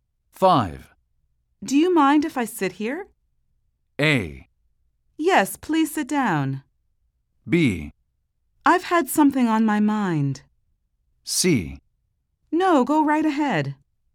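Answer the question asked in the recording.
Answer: C: No, go right ahead.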